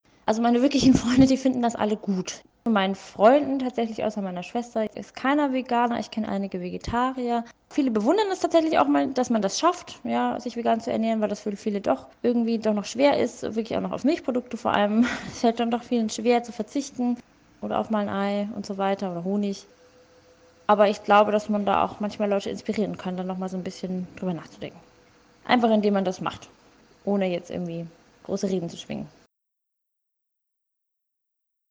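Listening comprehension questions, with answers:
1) So haben seine/ihre Freunde darauf reagiert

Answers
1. Ihre wirklichen Freunde finden es alle gut; viele bewundern, dass sie es schafft, sich vegan zu ernähren.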